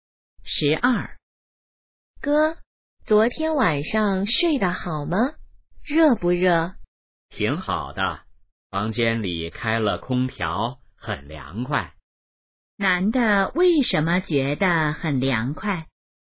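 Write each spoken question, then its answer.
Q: 男的为什么觉得很凉快?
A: 房间里开了空调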